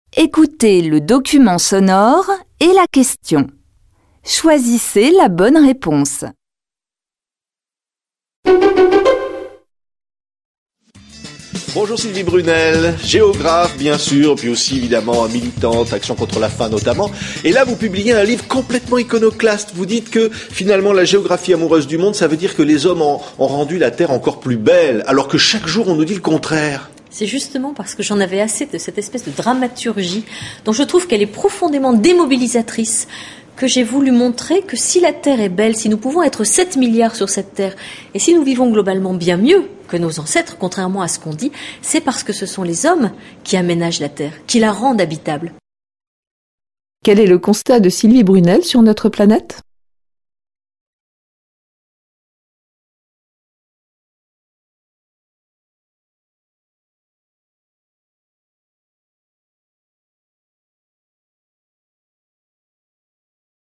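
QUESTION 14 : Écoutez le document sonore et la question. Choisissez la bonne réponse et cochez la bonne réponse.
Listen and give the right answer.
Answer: Les hommes ont rendu la Terre plus belle et habitable; nous vivons mieux que nos ancêtres.

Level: Tăng dần từ trình độ A1 đến C1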